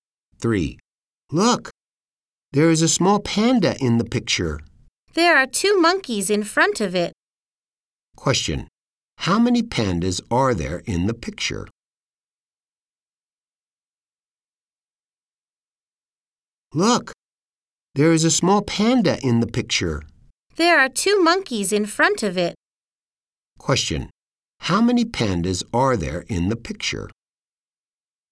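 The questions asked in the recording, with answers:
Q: How many pandas are there in the picture?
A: One.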